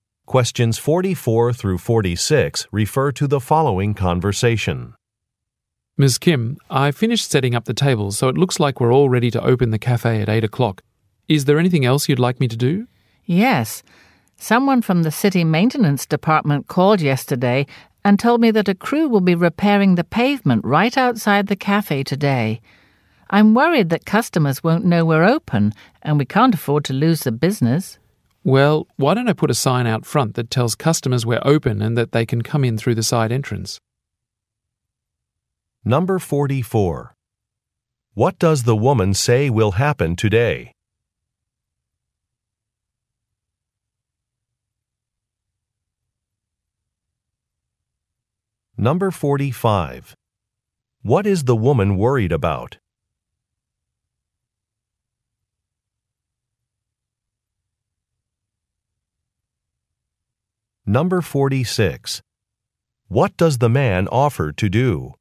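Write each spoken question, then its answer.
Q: What does the woman say will happen today?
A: A city crew will repair the pavement outside the cafe.

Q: What is the woman worried about?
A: Customers won't know the cafe is open, so it will lose business.

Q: What does the man offer to do?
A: Put a sign out front saying the cafe is open and to use the side entrance.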